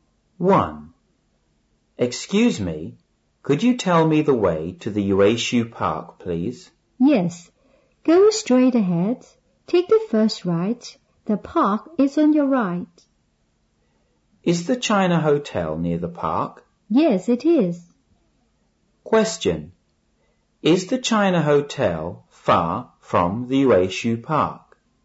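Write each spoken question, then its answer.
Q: Is the China Hotel far from the Yueshu Park?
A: No, it isn't.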